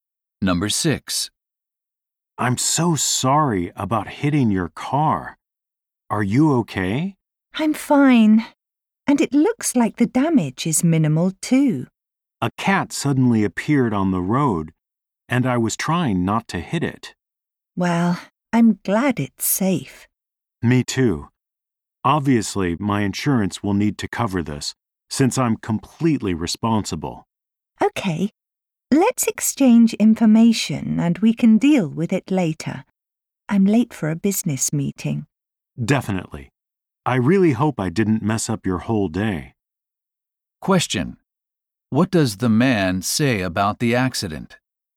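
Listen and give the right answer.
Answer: It was completely his fault, and his insurance will pay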